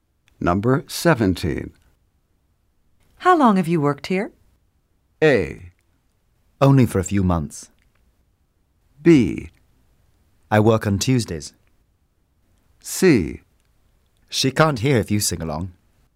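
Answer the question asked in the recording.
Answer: A: Only for a few months.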